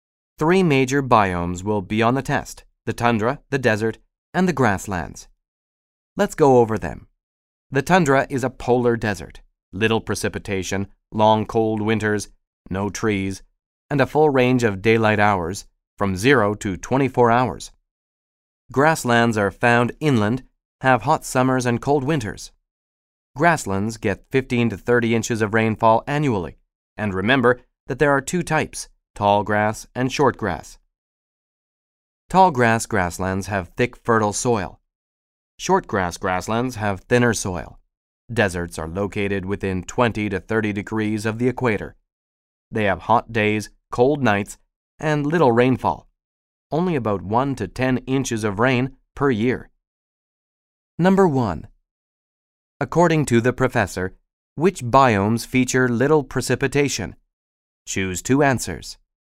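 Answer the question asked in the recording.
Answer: The tundra and the desert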